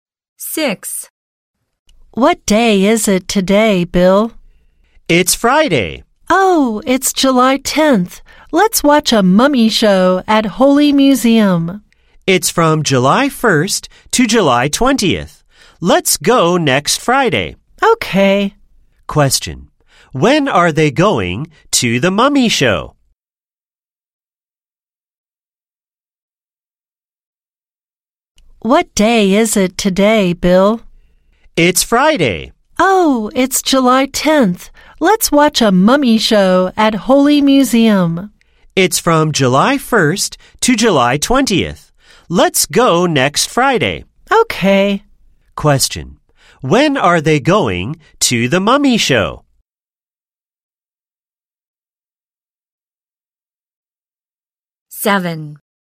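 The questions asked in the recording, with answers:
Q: When are they going to the mummy show?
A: Next Friday, July 17th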